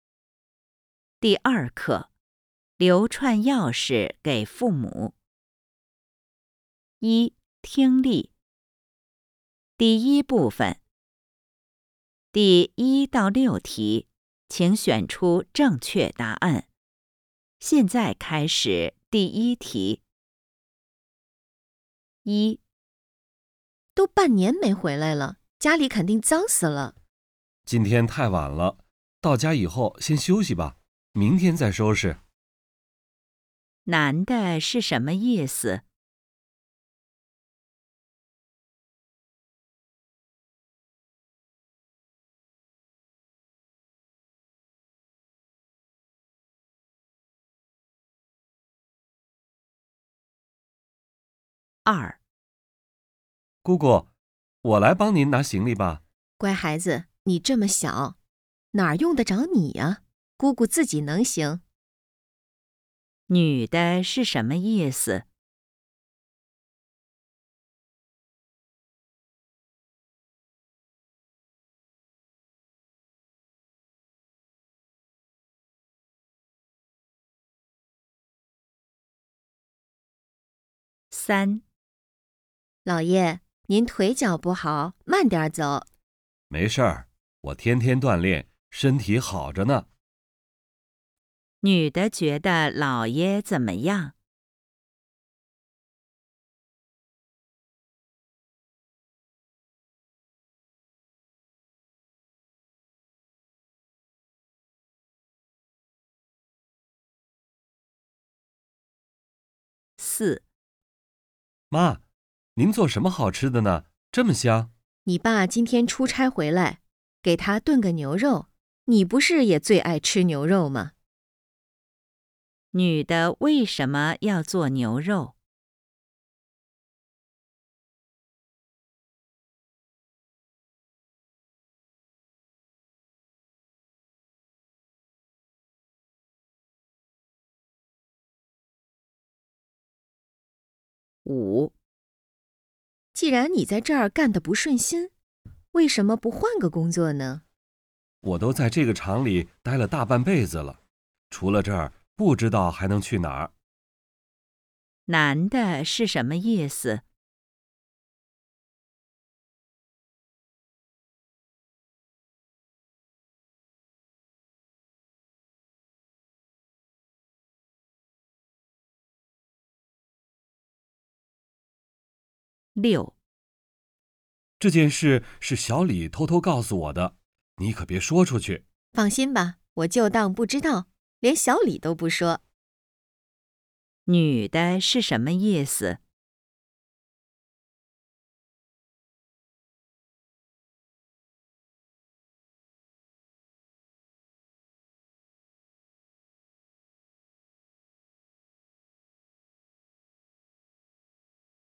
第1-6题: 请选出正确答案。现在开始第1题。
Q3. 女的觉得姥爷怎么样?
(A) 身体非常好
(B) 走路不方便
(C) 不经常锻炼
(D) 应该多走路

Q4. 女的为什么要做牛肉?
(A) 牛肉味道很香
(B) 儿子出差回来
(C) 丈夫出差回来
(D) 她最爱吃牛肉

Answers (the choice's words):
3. 走路不方便
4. 丈夫出差回来

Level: HSK5